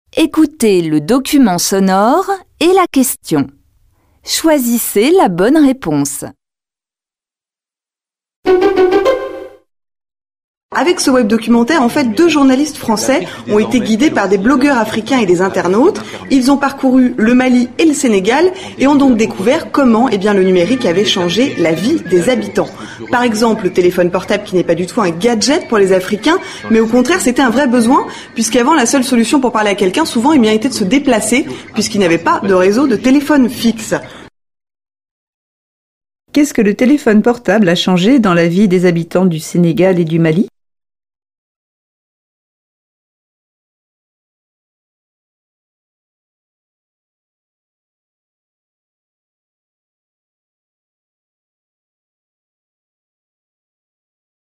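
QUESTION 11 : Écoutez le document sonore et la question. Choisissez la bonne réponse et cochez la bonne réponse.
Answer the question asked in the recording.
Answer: Ils n'ont plus besoin de se déplacer pour parler à quelqu'un.

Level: Tăng dần từ trình độ A1 đến C1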